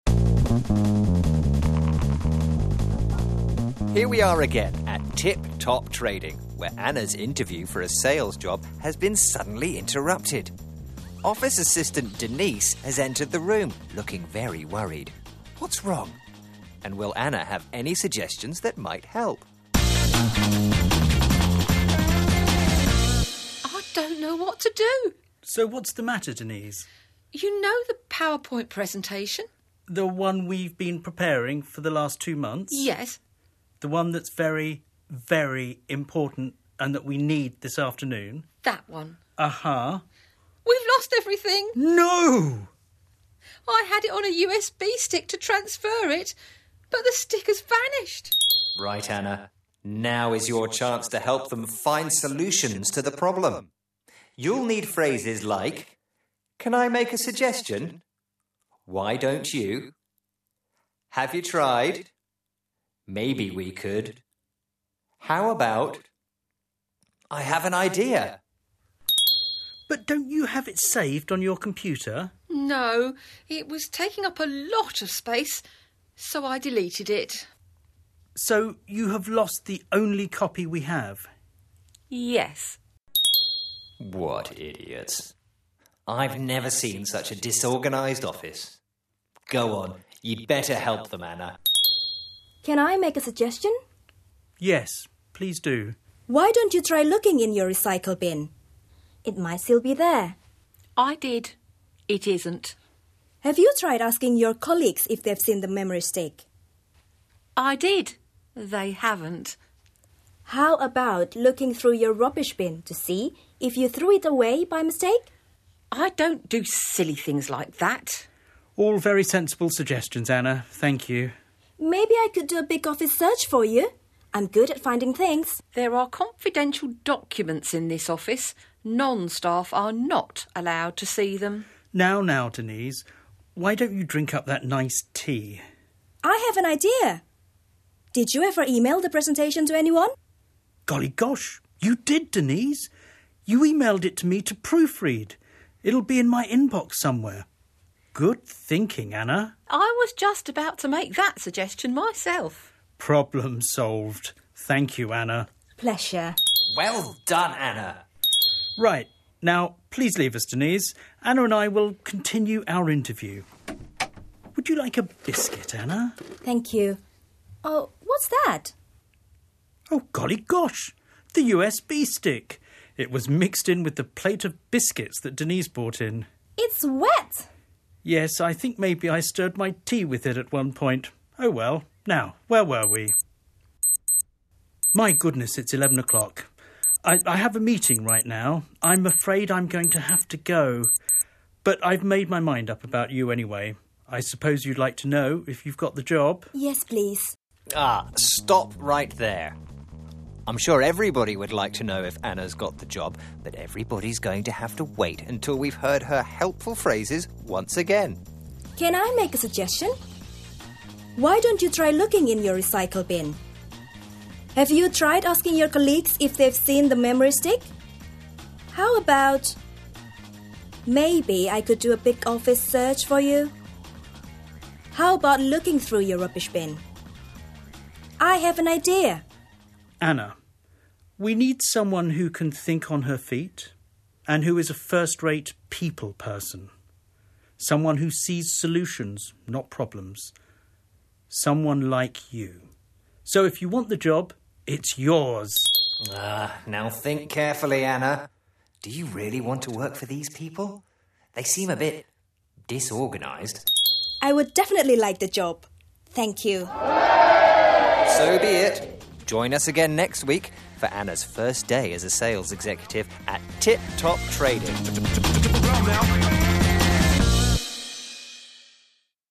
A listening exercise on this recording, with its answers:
Listening Challenge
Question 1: ?Why was the memory stick wet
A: Because it had been in Paul's tea

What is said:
Narrator: Here we are again at Tip Top Trading, where Anna's interview for a sales
job has been suddenly interrupted. Office assistant Denise has entered the
room, looking very worried. What's wrong? And will Anna have any
?suggestions that might help
Denise: I don't know what to do!
?Paul: So what's the matter Denise
?Denise: You know the PowerPoint presentation
?Paul: The one we've been preparing for the last two months
Denise: Yes.
?Paul: The one that's very, very important and that we need this afternoon
Denise: That one.
Denise: We've lost everything!
Paul: No!
Denise: I had it on a USB stick, to transfer it, but the stick has vanished!
Narrator: Right Anna, now is your chance to help them find solutions to the problem
You'll need phrases like
?Can I make a suggestion
?Why don't you
?Have you tried
?Maybe we could
?How about
I have an idea!
Paul: But don't you have it saved on your computer?
Denise: No, it was taking up a lot of space, so I deleted it.
Paul: So you have lost the only copy we have.
Denise: Yes.
Narrator: What idiots! I've never seen such a disorganised office. Go on, you'd better
help them, Anna
Anna: Why don't you try looking in your recycle bin? It might still be there.
Denise: I did. It isn't.
?Anna: Have you tried asking your colleagues if they've seen the memory stick
Denise: I did. They haven't
Anna: How about looking through your rubbish bin to see if you threw it away by
?mistake
Denise: (getting shirty) I don't do silly things like that!
Paul: All very sensible suggestions Anna, thank you
Anna: Maybe I could do a big office search for you...? I'm good at finding things
Denise: There are confidential documents in this office – non-staff are not allowed
to see them
?Paul: Now, now Denise. Why don't you drink up that nice tea
?Anna: I have an idea! Did you ever email the presentation to anyone
Paul: Golly gosh, you did Denise! You emailed it to me to proof-read. It'll be in
my inbox somewhere. Good thinking Anna
Denise: I was just about to suggest that myself
Paul: Problem solved. Thank you Anna
Anna: Pleasure
Narrator: Well done Anna!
Paul: Right, now please leave us Denise. Anna and I will continue our interview
?Would you like a biscuit Anna
?Anna: Thank you. Oh, what's that
Paul: Oh golly gosh, the USB stick! It was mixed in with the plate of biscuits that
Denise brought in.
Anna: It's wet
Paul: Yes, I think maybe I stirred my tea with it at one point. Oh well. Now,
?where were we
My goodness, it's 11 o'clock! I have a meeting right now! I'm afraid I'm
going to have to go. But I've made my mind up about you anyway. I
?suppose you'd like to know if you've got the job
?Anna: Yes please
Narrator: Ah - Stop right there! I'm sure everybody would like to know if Anna's got
the job – but everybody's going to have to wait until we've heard her
helpful phrases once again
Paul: Anna, we need someone who can think on her feet and who is a first-rate
people person. Someone who sees solutions, not problems... someone like
you! So if you want the job, it's yours
Narrator: Ah, now think carefully Anna – do you really want to work for these
people? They seem a bit... disorganised.
Anna: I would definitely like the job! Thank you
Narrator: So be it. Join us again next week for Anna's first day as a sales executive